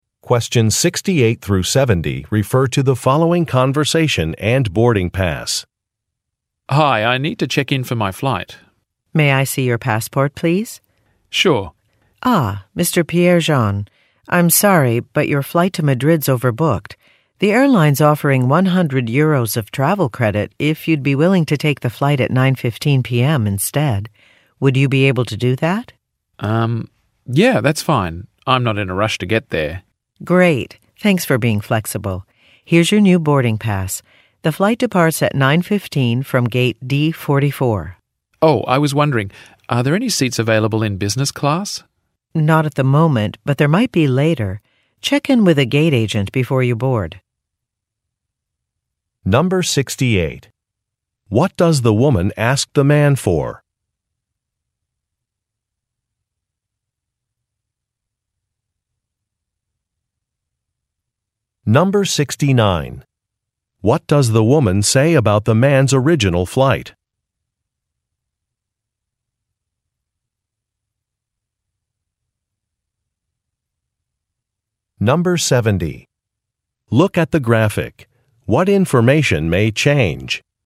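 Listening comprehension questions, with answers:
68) What does the woman ask the man for?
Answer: His passport

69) What does the woman say about the man's original flight?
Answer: It is overbooked.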